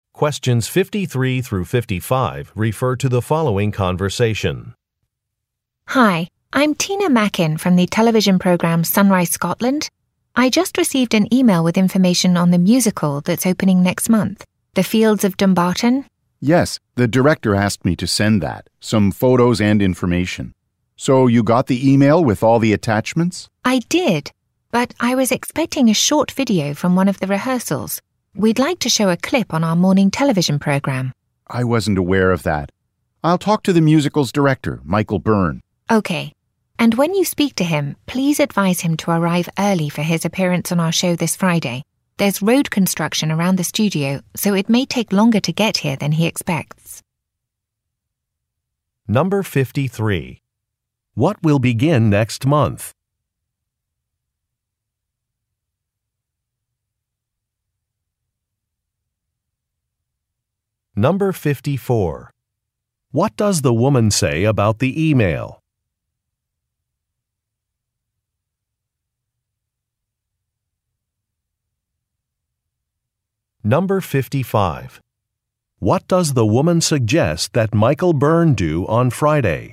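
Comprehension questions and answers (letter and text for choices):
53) What will begin next month?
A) A television show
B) A musical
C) A photo exhibition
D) A rehearsal for a music video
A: B) A musical

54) What does the woman say about the e-mail?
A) She is not happy with the attached photos.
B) She expected it to contain a video.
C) She thought it would arrive earlier.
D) She has not had time to read it.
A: B) She expected it to contain a video.

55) What does the woman suggest that Michael Byrne do on Friday?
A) Talk with her on the phone about a video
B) Share some ideas for a new musical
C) Help her with a problem at the studio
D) Allow extra time to get to his appointment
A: D) Allow extra time to get to his appointment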